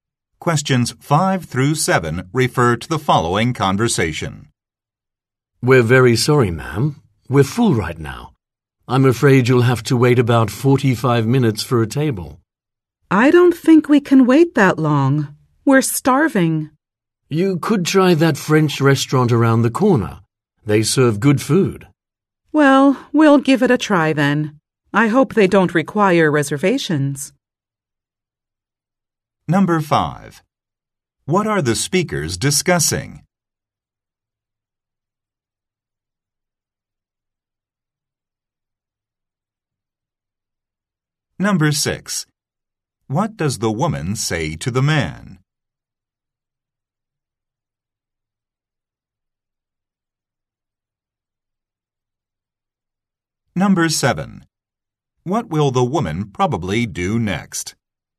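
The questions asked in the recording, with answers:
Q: What are the speakers discussing?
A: The restaurant is full and there is a long wait for a table

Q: What will the woman probably do next?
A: Go to the French restaurant around the corner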